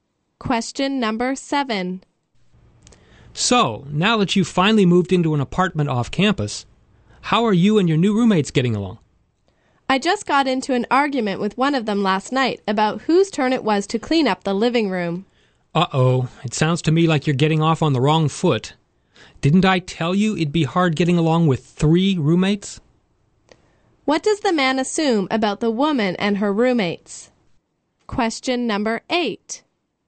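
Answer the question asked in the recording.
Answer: They are getting off to a bad start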